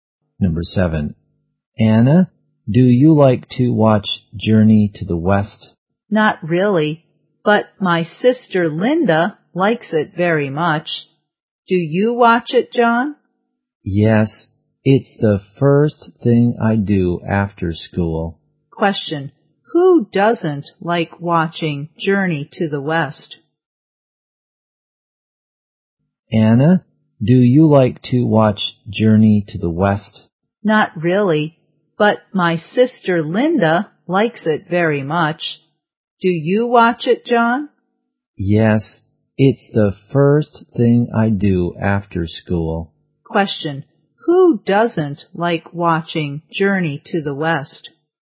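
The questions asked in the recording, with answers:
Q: who doesn't like watching Journey to the West?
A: Anna.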